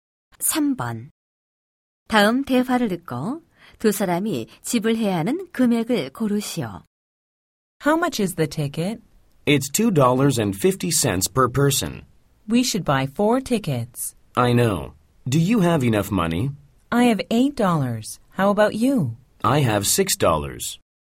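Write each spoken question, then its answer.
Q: 다음 대화를 듣고 두 사람이 지불해야 하는 금액을 고르시오.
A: $10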